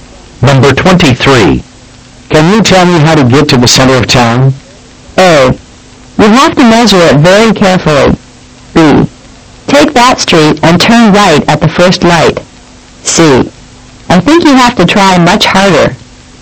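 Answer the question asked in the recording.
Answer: B: Take that street and turn right at the first light.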